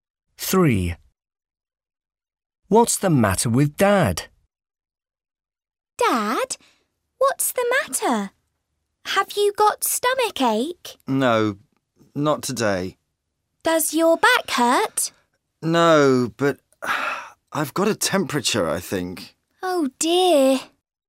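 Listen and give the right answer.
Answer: He has got a temperature.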